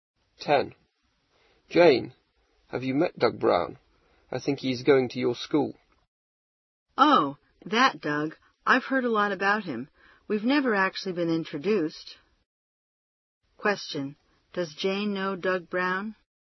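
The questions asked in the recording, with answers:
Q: Does Jane know Doug Brown?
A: No, she has only heard a lot about him; they've never been introduced.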